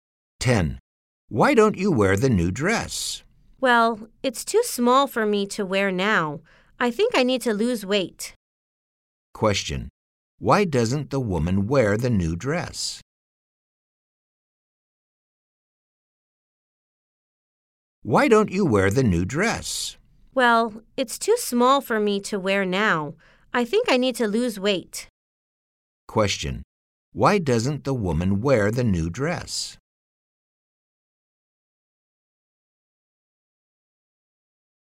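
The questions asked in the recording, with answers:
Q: Why doesn't the woman wear the new dress?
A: It's too small for her to wear now.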